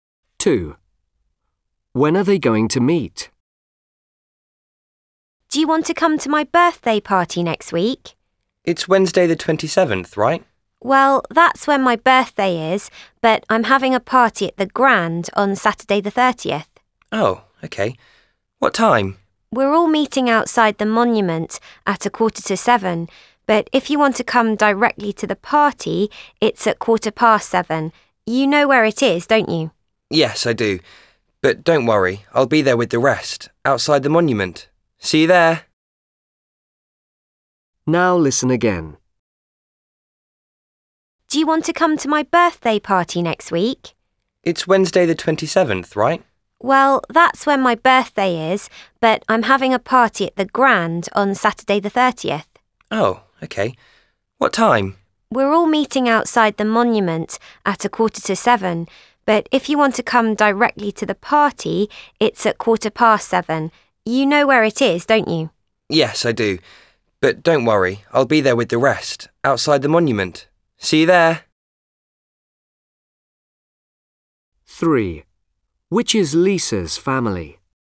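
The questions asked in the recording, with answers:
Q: When are they going to meet?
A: Saturday the 30th at 6:45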